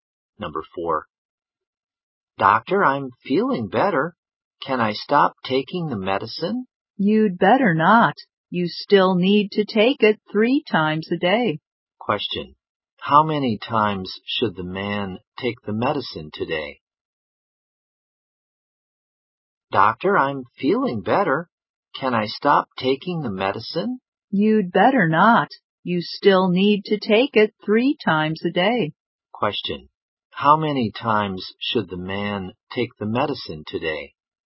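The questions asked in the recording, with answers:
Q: Question. How many times should the man take the medicine today?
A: Three times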